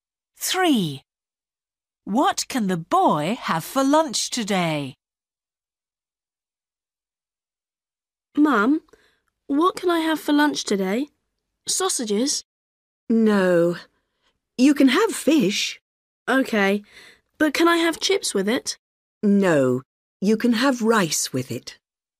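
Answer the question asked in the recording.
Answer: fish and rice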